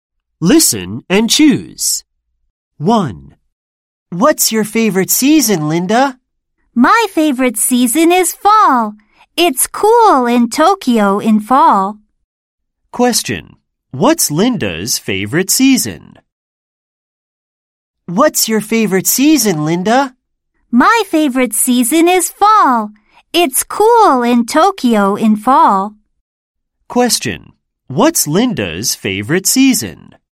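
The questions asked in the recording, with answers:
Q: What's Linda's favorite season?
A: Fall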